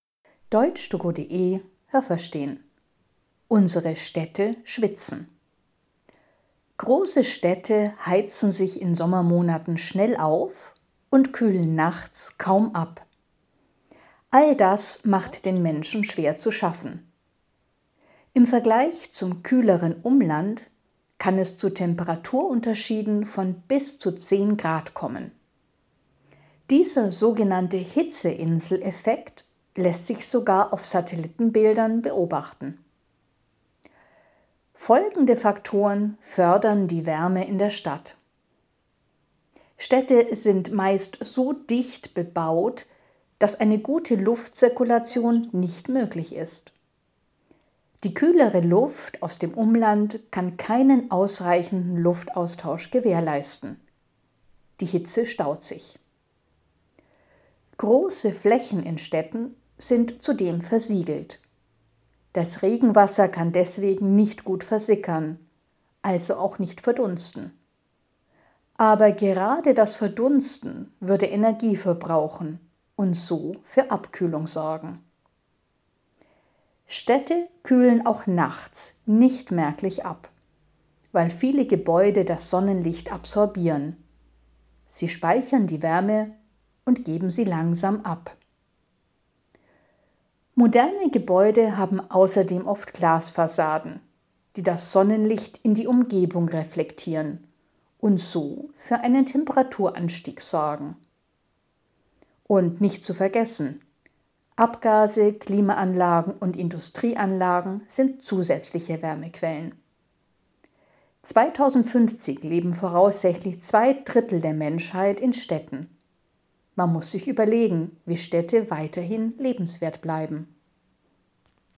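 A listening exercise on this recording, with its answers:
Haben Sie das gehört? Stimmt diese Aussage?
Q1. Die Menschen leiden darunter, dass sich Städte tagsüber aufheizen und erst nachts richtig gut abkühlen.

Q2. In Städten kann es bis zu 10 Grad heißer sein als im Umland.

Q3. Die dichte Bebauung in Städten erschwert eine gute Luftzirkulation, weshalb sich die Hitze staut.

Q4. Da große Flächen in den Städten versiegelt sind, sorgt das für Abkühlung.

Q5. Viele Gebäude absorbieren das Sonnenlicht und geben die Wärme auch nachts ab.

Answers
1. Nein, das habe ich nicht gehört.
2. Ja, das habe ich gehört.
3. Ja, das habe ich gehört.
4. Nein, das habe ich nicht gehört.
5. Ja, das habe ich gehört.

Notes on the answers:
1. Die Menschen leiden, weil die Städte auch nachts kaum abkühlen.
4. Genau das Gegenteil ist der Fall: Die Böden sind versiegelt, das Regenwasser kann nicht versickern und nicht verdunsten. 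Deshalb findet keine Abkühlung statt.

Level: C1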